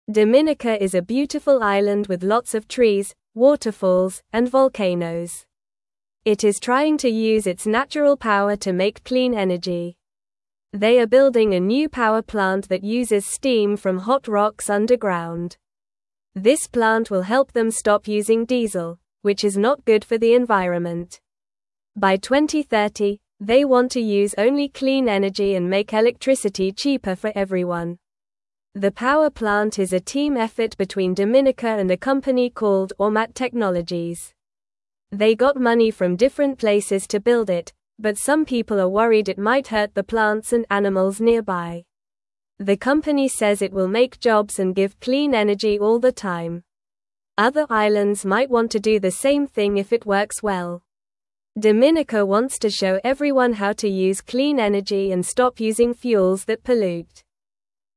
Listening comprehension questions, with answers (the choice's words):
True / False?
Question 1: The power plant uses steam from cold rocks.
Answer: False

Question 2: A company called Ormat Technologies is helping.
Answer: True

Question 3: Dominica wants to make clean energy.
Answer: True

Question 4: They are demolishing a new power plant.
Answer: False

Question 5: Some people are not concerned the plant might hurt plants and animals.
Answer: False

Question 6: The plant will help stop using diesel.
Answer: True

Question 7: By 2030, Dominica wants only clean energy.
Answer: True

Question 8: Dominica is an ugly island with no trees and waterfalls.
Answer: False

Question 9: What is Dominica?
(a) A city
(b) A country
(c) A mountain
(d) An island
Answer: An island

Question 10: What does Dominica want to make?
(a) Clean energy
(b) Dirty energy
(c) More cars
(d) More buildings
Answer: Clean energy

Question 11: What is the new power plant using?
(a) Water from the ocean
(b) Wind from the sky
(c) Steam from hot rocks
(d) Sunlight from the sun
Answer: Steam from hot rocks

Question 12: What does Dominica want to stop using?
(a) Diesel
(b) Water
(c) Food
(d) Trees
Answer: Diesel

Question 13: Who is helping Dominica build the power plant?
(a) Other islands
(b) The government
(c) The people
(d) Ormat Technologies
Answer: Ormat Technologies

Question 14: What do some people worry about?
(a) The weather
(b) Plants and animals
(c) The ocean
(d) The roads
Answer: Plants and animals

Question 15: What do other islands want to do?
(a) Make more pollution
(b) Use clean energy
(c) Build more roads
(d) Grow more trees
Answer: Use clean energy

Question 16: It is (1)______ to use its natural power to make (2)______ energy.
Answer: trying

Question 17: It is (1)______ to use its natural power to make (2)______ energy.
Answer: clean

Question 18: By 2030, they want to use only clean energy and (3)______ electricity cheaper for everyone.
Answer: make

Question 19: The (4)______ plant is a team effort between Dominica and a (5)______ called Ormat Technologies.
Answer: power

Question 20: The (4)______ plant is a team effort between Dominica and a (5)______ called Ormat Technologies.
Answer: company

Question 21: They got money from different places to build it, but some people are (6)______ it might hurt the plants and animals nearby.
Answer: worried

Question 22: Other (7)______ might want to do the same thing if it works well.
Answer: islands

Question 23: Dominica wants to (8)______ everyone how to use clean energy and stop using fuels that pollute.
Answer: show

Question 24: What is Dominica known for?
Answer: Dominica is known for its trees, waterfalls, and volcanoes.

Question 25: What kind of energy is Dominica trying to use?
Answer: Dominica is trying to use clean energy.

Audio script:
Dominica is a beautiful island with lots of trees, waterfalls, and volcanoes. It is trying to use its natural power to make clean energy. They are building a new power plant that uses steam from hot rocks underground. This plant will help them stop using diesel, which is not good for the environment. By 2030, they want to use only clean energy and make electricity cheaper for everyone.
The power plant is a team effort between Dominica and a company called Ormat Technologies. They got money from different places to build it, but some people are worried it might hurt the plants and animals nearby. The company says it will make jobs and give clean energy all the time. Other islands might want to do the same thing if it works well. Dominica wants to show everyone how to use clean energy and stop using fuels that pollute.

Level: Level 1